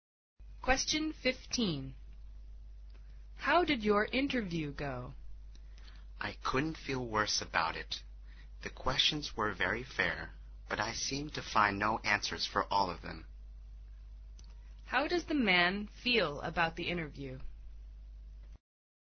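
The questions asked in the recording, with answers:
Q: How does the man feel about the interview?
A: Very bad; he couldn't answer the questions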